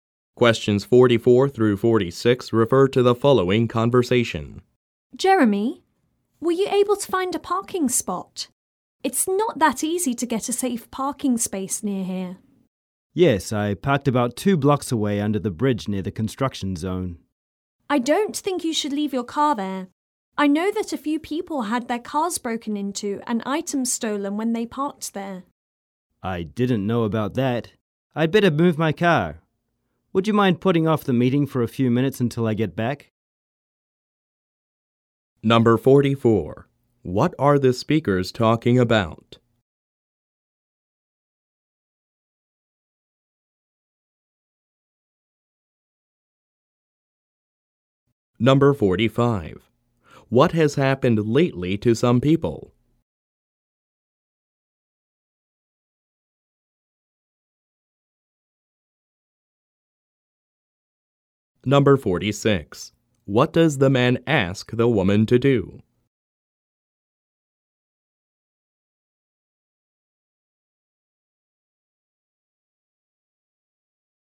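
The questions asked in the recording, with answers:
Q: What are the speakers talking about?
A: Where the man parked his car

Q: What has happened lately to some people?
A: Their cars were broken into and items stolen

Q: What does the man ask the woman to do?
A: Postpone the meeting for a few minutes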